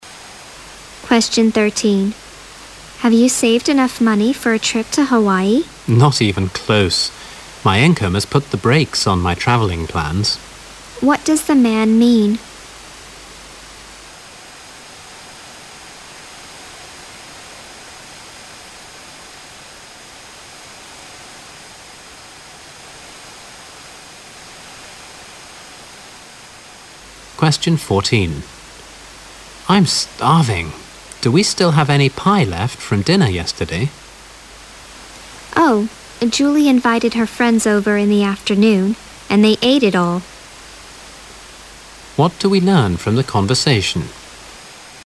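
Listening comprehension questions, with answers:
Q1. Q: What does the man mean?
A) His trip to Hawaii has used up all his money.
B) He usually checks his brakes before a trip.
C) His trip to Hawaii was not enjoyable.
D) He can't afford to go traveling yet.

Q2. Q: What do we learn from the conversation?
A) There was nothing left except some pie.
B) The woman is going to prepare the dinner.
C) The man has to find something else to eat.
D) Julie has been invited for dinner.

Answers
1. D
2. C

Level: 六级

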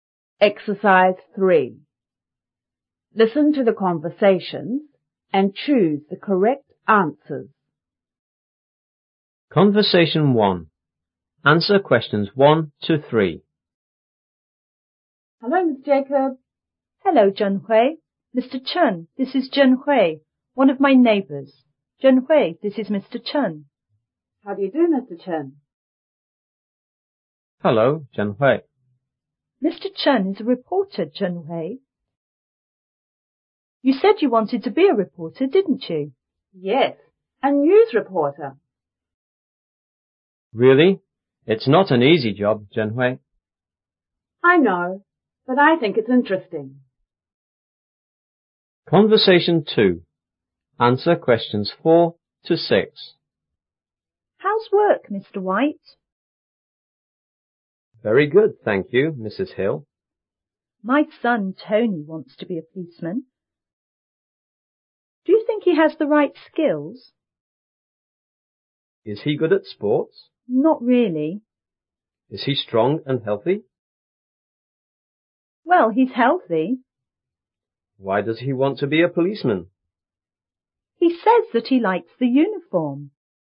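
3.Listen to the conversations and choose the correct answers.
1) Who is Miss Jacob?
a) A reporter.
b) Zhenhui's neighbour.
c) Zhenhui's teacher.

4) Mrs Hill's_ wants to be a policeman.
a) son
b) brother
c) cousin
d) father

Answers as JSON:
{"1": "b", "4": "a"}

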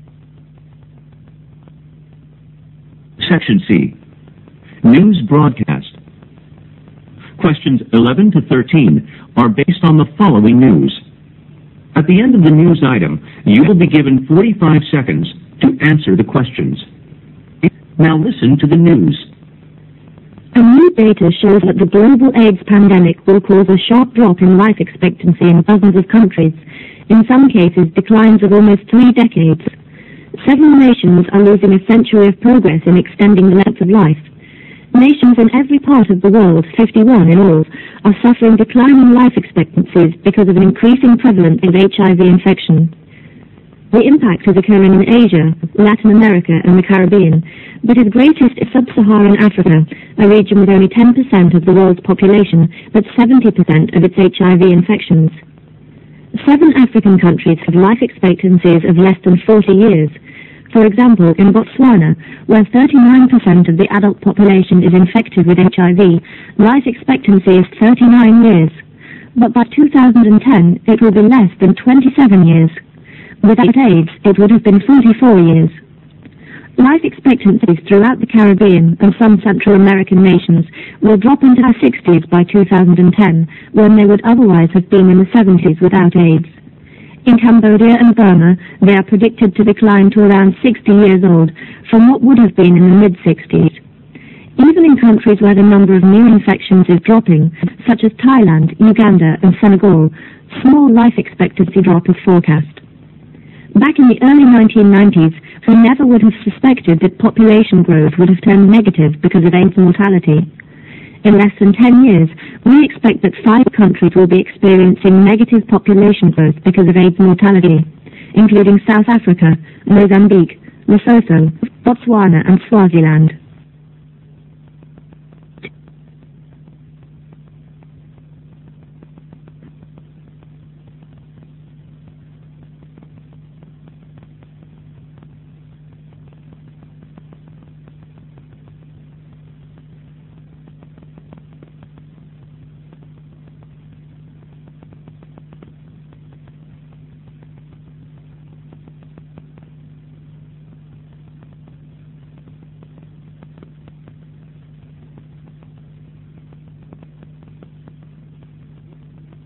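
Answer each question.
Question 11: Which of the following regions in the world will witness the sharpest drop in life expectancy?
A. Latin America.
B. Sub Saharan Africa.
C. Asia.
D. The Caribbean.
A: B

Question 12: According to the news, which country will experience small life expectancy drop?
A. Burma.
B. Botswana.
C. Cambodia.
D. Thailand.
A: D

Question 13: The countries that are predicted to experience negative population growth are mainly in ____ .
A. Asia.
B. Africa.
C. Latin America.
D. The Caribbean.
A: B

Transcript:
SECTION C
A new data shows that the global AIDS pandemic will cause a sharp drop in life expectancy in dozens of countries, in some cases, declines of three decades. Several nations are losing a century's progress in extending the length of life. Nations in every part of the world, 51 in all, are suffering declining life expectancies because of an increasing prevalence of HIV infection. 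The increase is occurring in Asia, Latin America, and the Carribbean, but is greatest in subSaharan Africa, a region with only 10% of the world's population but 70% of the world's HIV infections. Seven African countries have life expectancies of less than 40 years. For example, in Botswana, where 39% of the adult population is infected with HIV, life expectancy is 39 years. But by 2010, it will be less than 27 years. Without AIDS, it would have been 44 years. Life expectancy throughout the Carribbean and some Central American nations will drop into the 60's by 2010, when they would otherwise have been in the 70's without AIDS. In Cambodia and Burma, they are predicted to decline to around 60 years old, to what otherwise would have been in the mid 60's. Even in countries where the number of new infections is dropping, such as Thailand, Uganda, and Senegal, small life expectancy drop is forecast. 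Back in the early 1990's, we never would have suspected that population growth would have turned negative because of AIDS mortality. In less than 10 years, we expect that 5 countries will be experiencing negative population growth because of AIDS mortality, including South Africa, Mozambique, Lesotho, Botswana and Swaziland.

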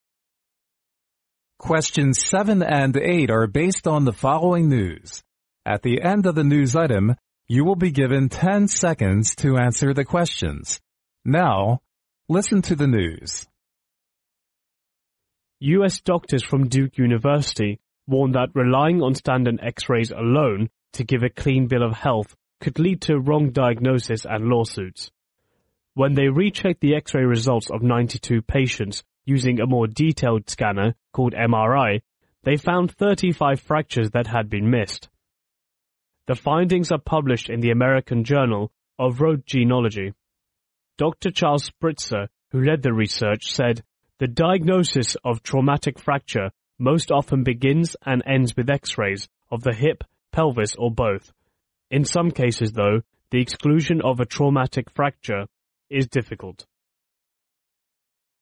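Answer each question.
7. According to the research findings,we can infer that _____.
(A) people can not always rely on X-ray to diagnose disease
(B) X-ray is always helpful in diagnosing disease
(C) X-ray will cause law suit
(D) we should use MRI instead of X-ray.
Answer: A

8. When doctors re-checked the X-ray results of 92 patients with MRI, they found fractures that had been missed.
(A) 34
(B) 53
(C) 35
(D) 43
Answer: C

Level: 专业四级

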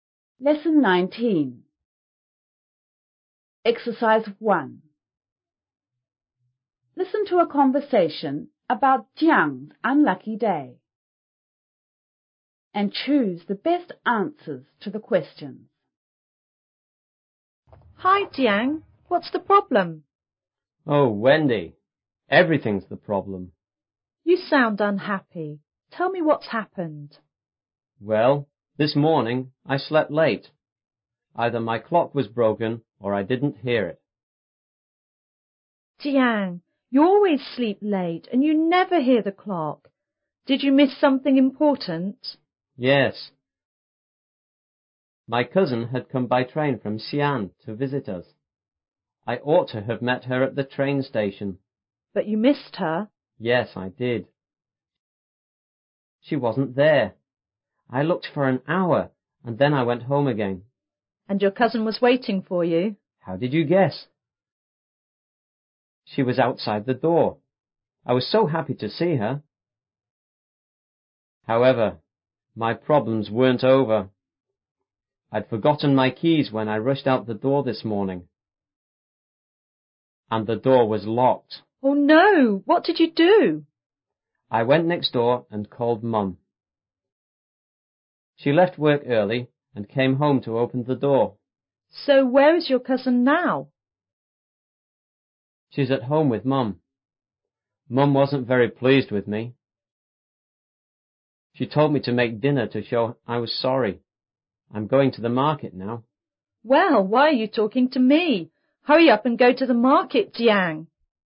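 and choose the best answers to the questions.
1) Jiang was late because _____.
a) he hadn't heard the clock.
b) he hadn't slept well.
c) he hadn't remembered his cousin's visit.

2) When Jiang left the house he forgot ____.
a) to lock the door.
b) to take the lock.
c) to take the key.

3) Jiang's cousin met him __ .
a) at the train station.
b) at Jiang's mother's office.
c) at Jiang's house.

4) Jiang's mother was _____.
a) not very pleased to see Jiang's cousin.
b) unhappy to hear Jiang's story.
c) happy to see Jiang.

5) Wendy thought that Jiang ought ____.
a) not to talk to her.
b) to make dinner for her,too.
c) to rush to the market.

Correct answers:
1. a
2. c
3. c
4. b
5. c

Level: 初中英语广州版5B

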